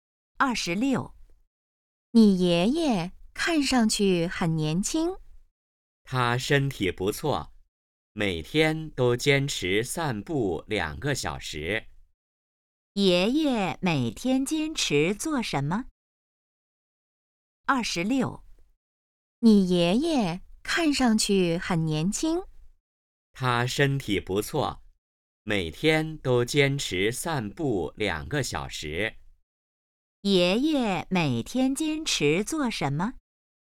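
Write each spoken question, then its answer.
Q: 爷爷每天坚持做什么?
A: 散步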